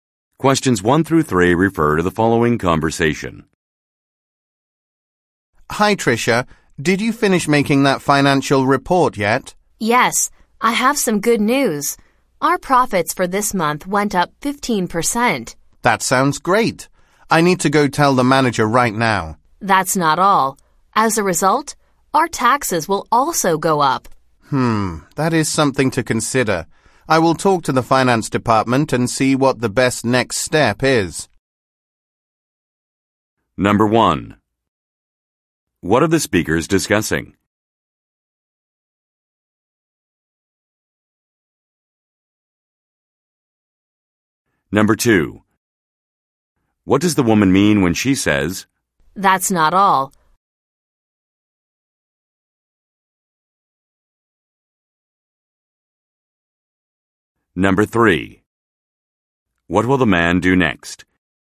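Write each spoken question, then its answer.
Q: What are the speakers discussing?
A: A financial report showing profits up 15% this month

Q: What does the woman mean when she says, "That's not all"?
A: There is more news: their taxes will also go up

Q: What will the man do next?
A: Talk to the finance department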